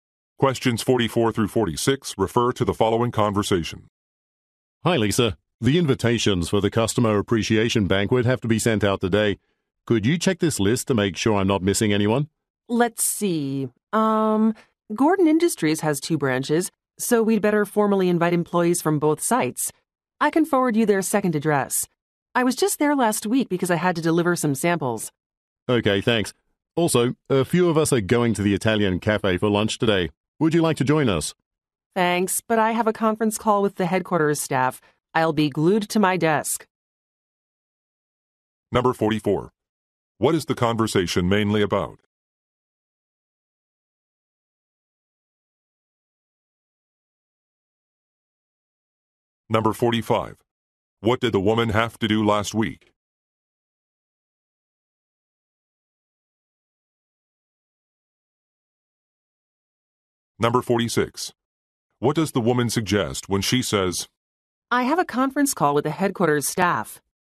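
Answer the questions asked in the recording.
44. Sending invitations to a customer appreciation banquet
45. Deliver some samples
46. She can't join them for lunch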